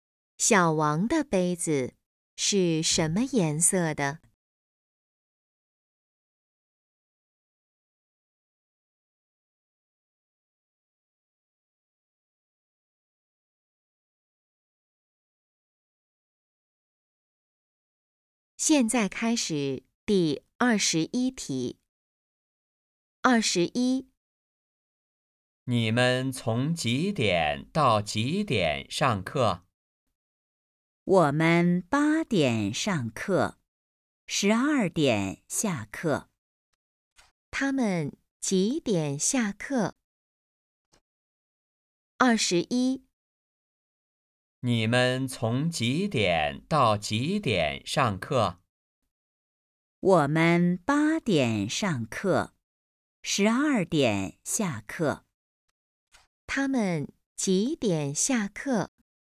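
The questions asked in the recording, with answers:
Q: 他们几点下课?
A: 十二点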